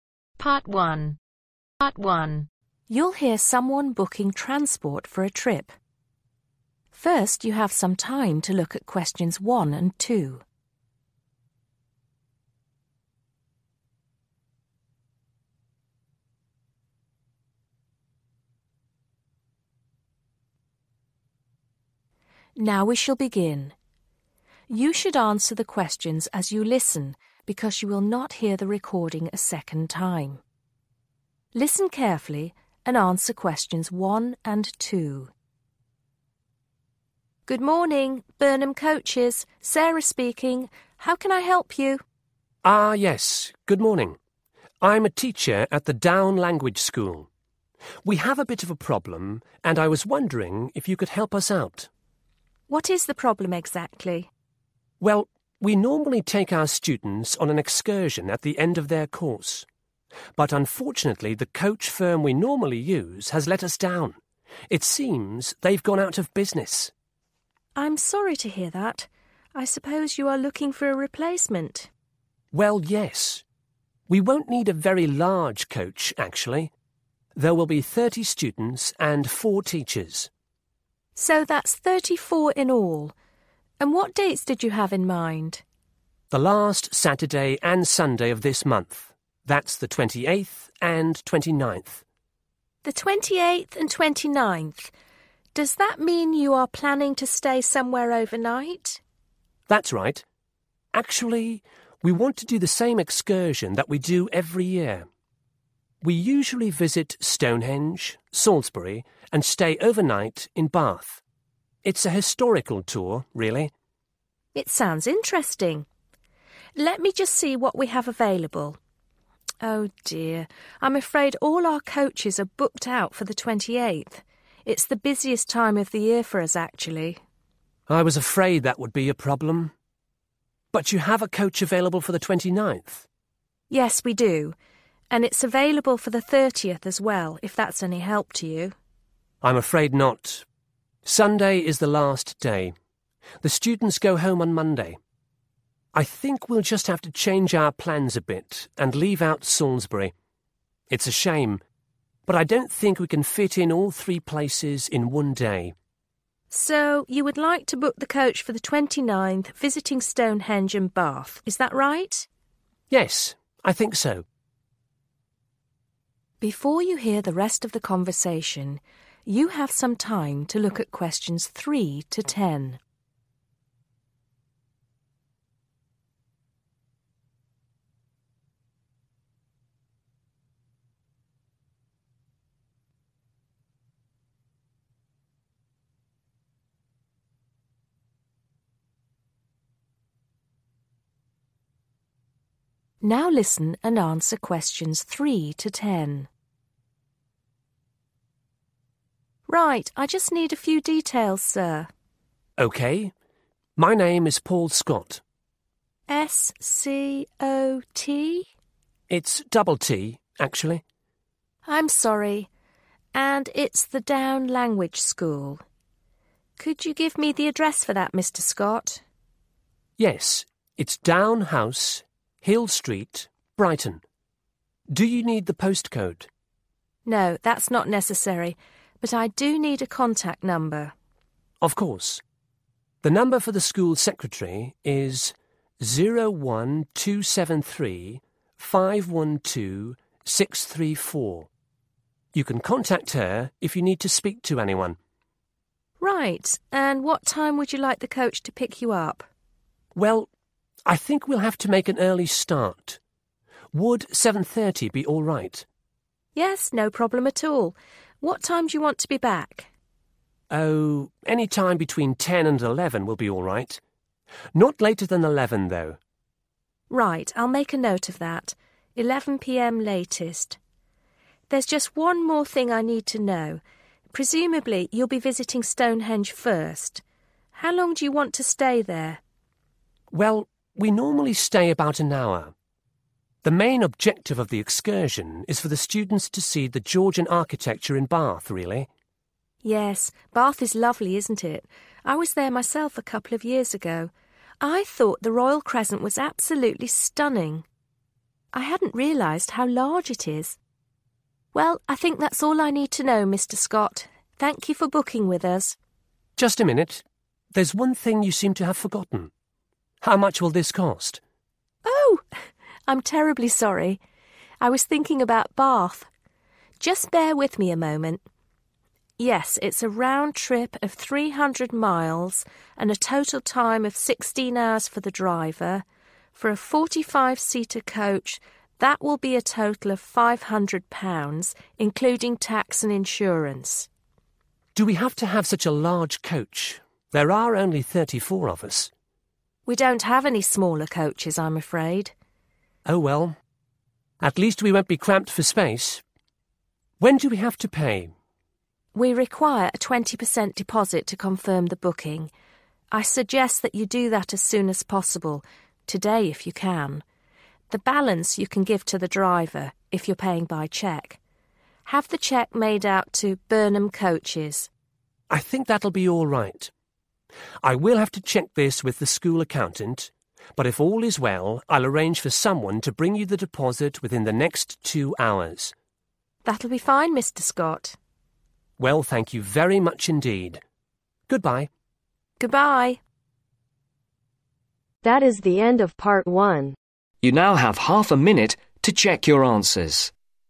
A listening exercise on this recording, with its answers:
Complete the sentences below. Write ONE WORD AND/OR A NUMBER for each answer.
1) There will be ............ passengers on the coach.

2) The students leave the school on ............ .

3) Name of Client: (3)............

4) Down house (4)............ Brighton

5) Contact number: (5) The ............ to be contacted on 01273512634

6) Pick-up time: (6)............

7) Return time: (7)............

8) Purpose of Hire: Visit to Stonehenge and (8)............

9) What does the cost of the hiring the coach include ?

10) Who does the customer have to speak to before confirming the booking ?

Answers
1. 34
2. Monday
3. Paul Scott
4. Hill Street
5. School Secretary
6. 7.30
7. 11 pm
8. Bath
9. Tax and Insurance
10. (the) school accountant